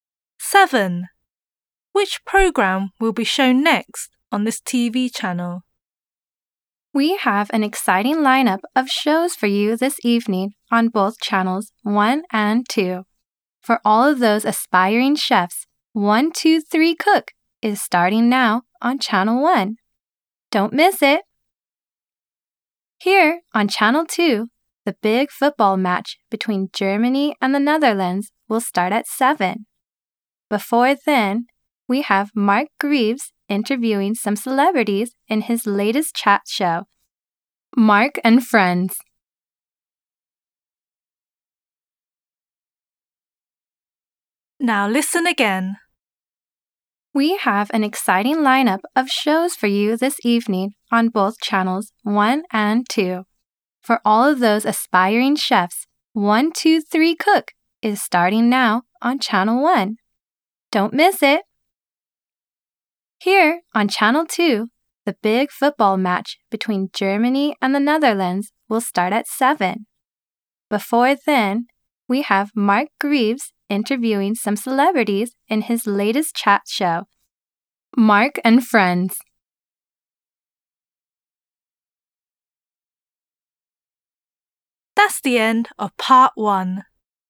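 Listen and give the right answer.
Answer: Mark and Friends, a chat show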